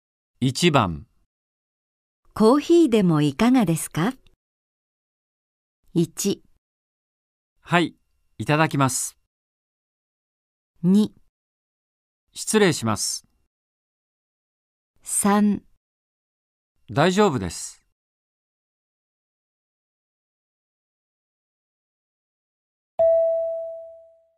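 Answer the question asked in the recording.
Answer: 1: はい、いただきます。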